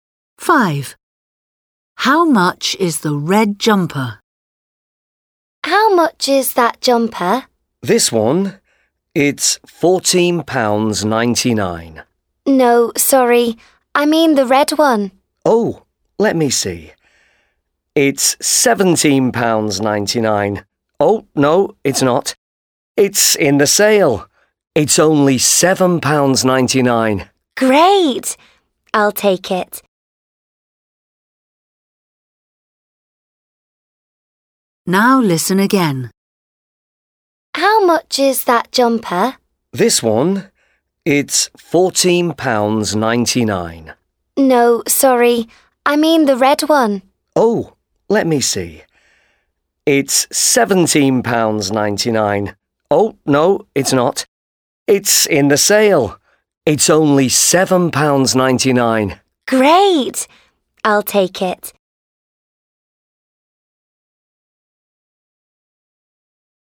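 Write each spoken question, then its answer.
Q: How much is the red jumper?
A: £7.99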